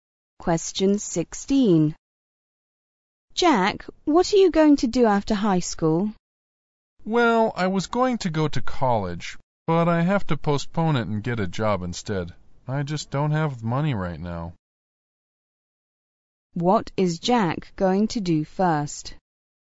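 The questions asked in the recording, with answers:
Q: What is Jack going to do first?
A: Get a job.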